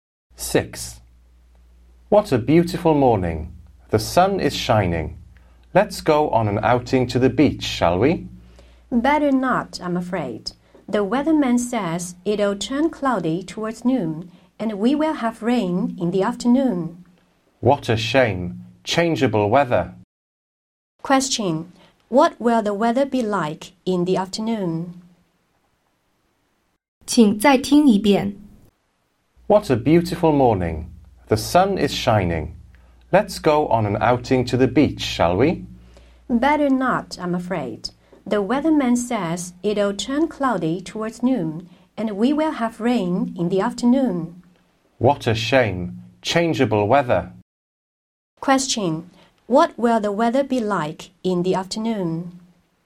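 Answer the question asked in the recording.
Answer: Rainy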